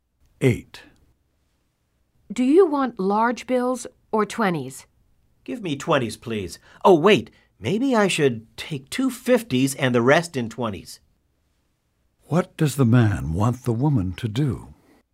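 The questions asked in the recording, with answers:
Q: What does the man want the woman to do?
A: Give him two 50s and the rest in 20s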